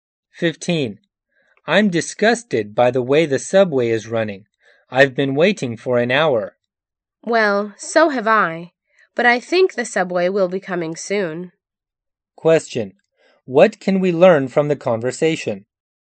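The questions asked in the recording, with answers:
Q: What can we learn from the conversation?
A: Both have waited an hour for a delayed subway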